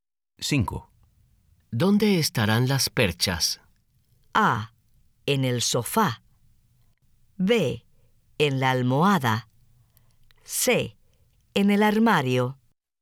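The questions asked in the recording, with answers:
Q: ¿Dónde estarán las perchas?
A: C: En el armario.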